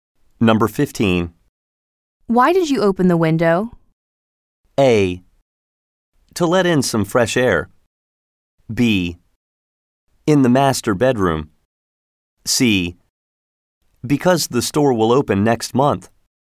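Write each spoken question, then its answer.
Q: Why did you open the window?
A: A: To let in some fresh air.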